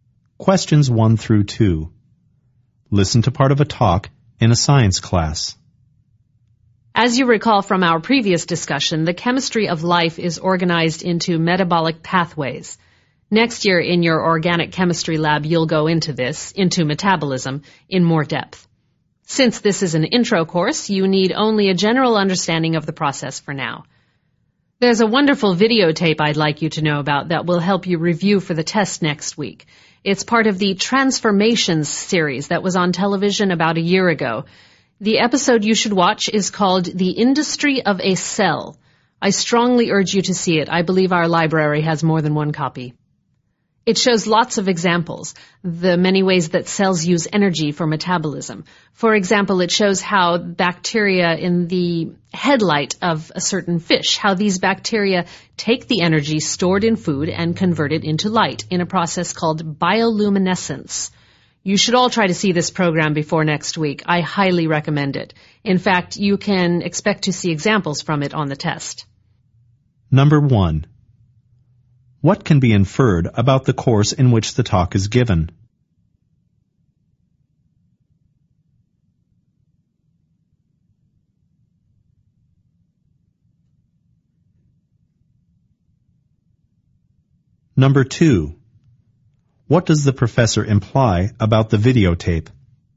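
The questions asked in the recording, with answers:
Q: What can be inferred about the course in which the talk is given?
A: It is an introductory science course

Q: What does the professor imply about the videotape?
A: It will help students review, and examples from it will be on the test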